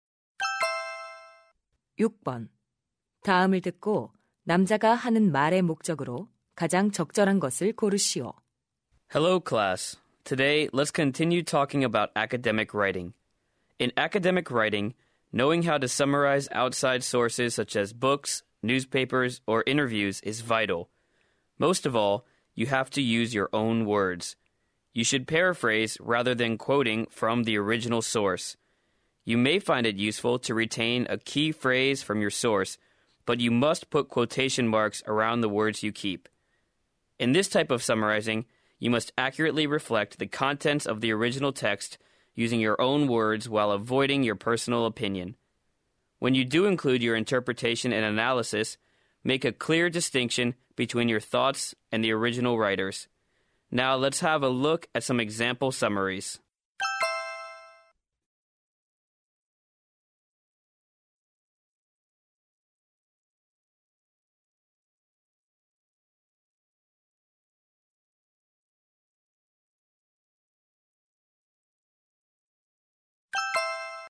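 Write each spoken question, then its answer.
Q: 다음을 듣고 남자가 하는 말의 목적으로 가장 적절한 것을 고르시오.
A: 학술적 글쓰기에서 외부 자료를 요약하는 방법을 설명하려고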